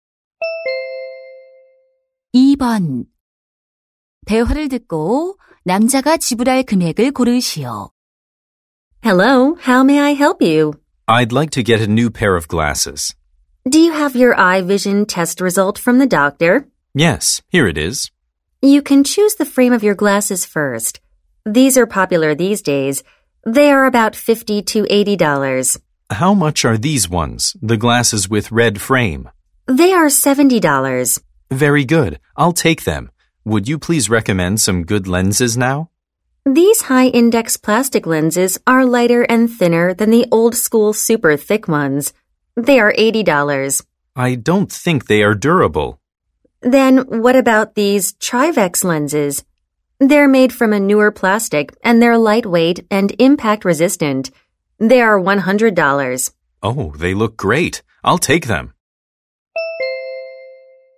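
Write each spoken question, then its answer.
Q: 대화를 듣고 남자가 지불할 금액을 고르시오.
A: $170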